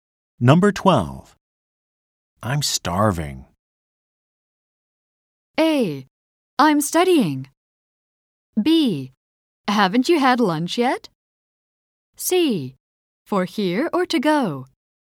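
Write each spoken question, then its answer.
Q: I'm starving.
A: B: Haven't you had lunch yet?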